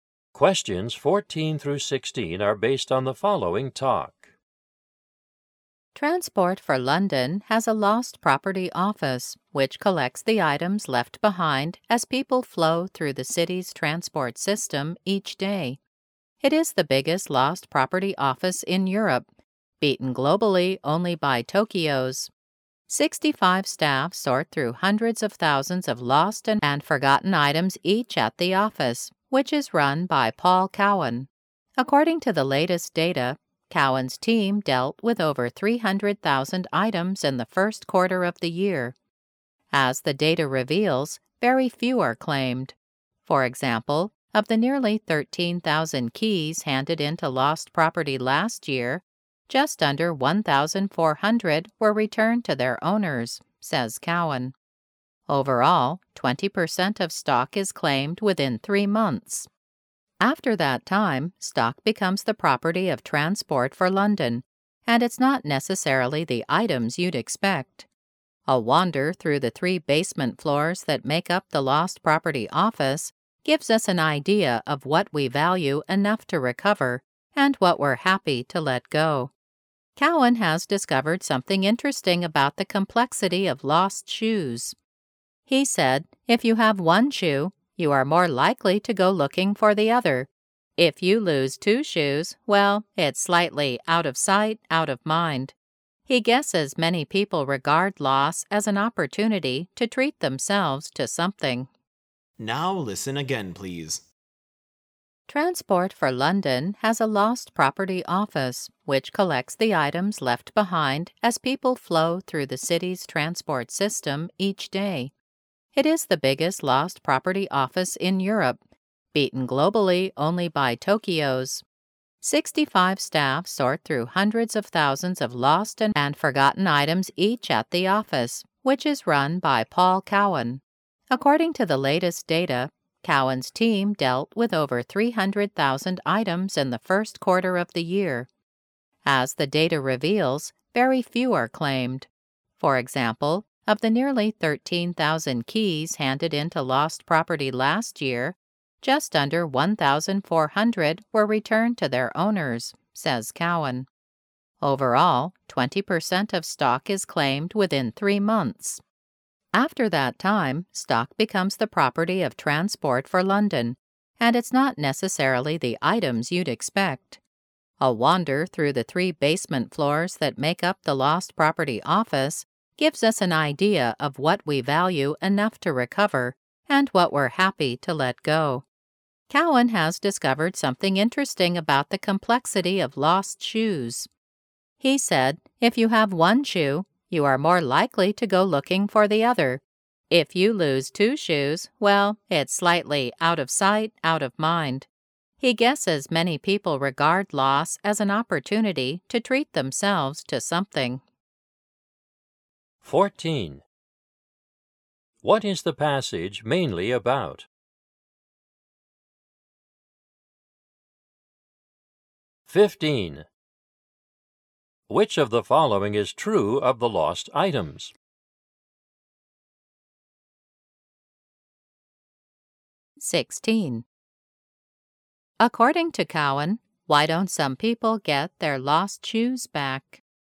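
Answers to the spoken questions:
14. The lost property office of Transport for London
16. They see the loss as a chance to buy themselves new ones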